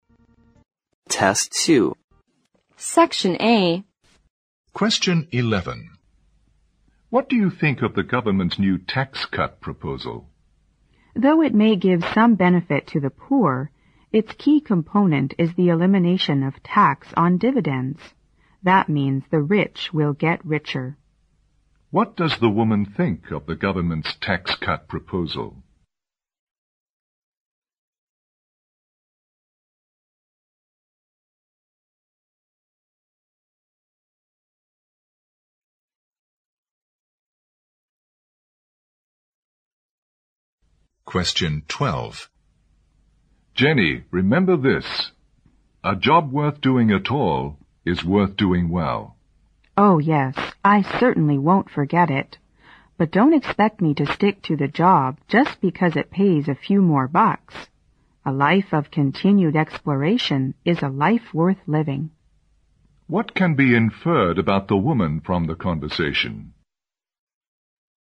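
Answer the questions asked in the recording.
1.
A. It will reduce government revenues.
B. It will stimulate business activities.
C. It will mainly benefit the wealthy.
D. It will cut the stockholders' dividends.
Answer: C. It will mainly benefit the wealthy.
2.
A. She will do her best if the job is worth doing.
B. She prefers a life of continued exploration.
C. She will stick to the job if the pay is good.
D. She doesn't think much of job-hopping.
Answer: B. She prefers a life of continued exploration.

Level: 六级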